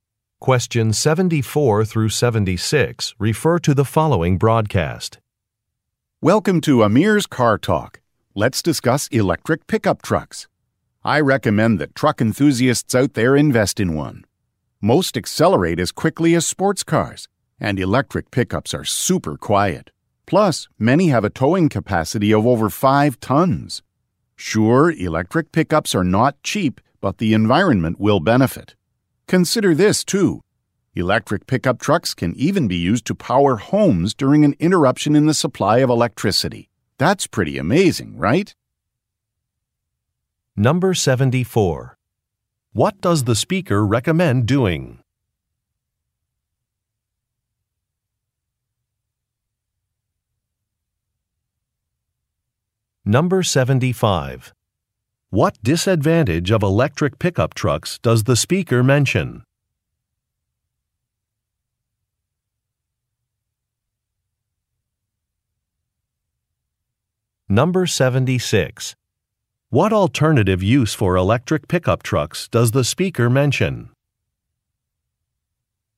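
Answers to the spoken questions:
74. Buying an electric pickup truck
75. They are expensive
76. Powering homes during a power outage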